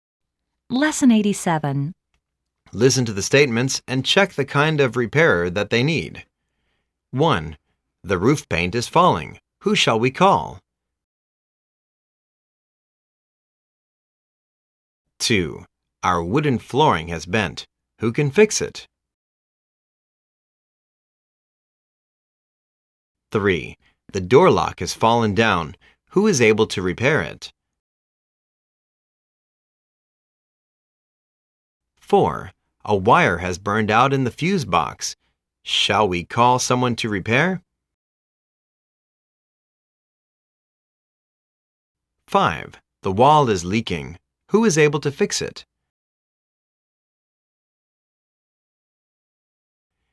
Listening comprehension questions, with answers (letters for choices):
Listen to the statements, and check the kind of repairer that they need.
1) The roof paint is falling. Who shall we call?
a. Let's call the house contractor.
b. Let's call the house mover.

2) Our wooden flooring has bent. Who can fix it?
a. The electrician can fix it.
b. The carpenter can fix it.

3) The door lock has fallen down. Who is able to repair it?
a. Call the roofer.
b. Call the locksmith.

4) A wire has burned out in the fuse box. Shall we call someone to repair?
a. Yes, we shall call an electrician.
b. Yes, we shall call an exterminator.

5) The wall is leaking. Who is able to fix it?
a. The plumber can fix it.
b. The carpenter can fix it.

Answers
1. a
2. b
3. b
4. a
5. a